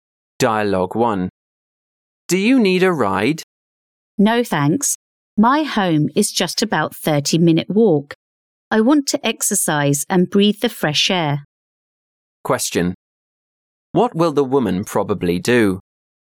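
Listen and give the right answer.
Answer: Walk home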